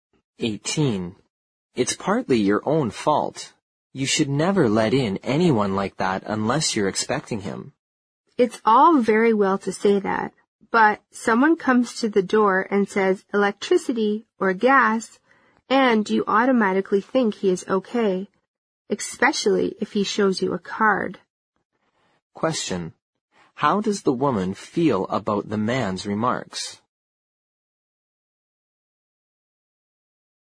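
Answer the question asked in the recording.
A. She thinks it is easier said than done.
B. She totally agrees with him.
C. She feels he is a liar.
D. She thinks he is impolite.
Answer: A. She thinks it is easier said than done.

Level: 六级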